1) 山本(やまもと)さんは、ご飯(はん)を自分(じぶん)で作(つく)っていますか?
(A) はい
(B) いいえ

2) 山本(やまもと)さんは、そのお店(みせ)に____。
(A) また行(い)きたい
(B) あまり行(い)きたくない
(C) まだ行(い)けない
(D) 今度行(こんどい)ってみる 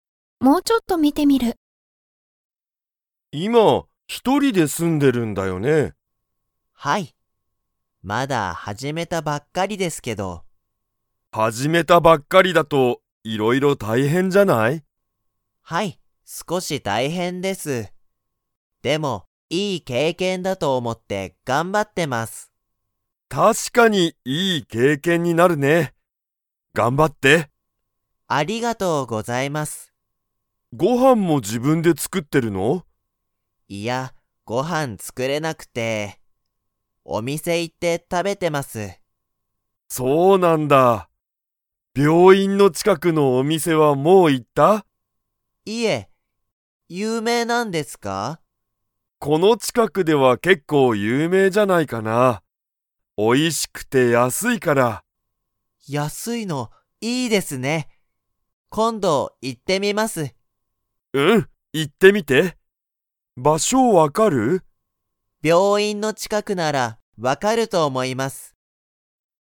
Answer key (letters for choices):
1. B
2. D

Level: Level 2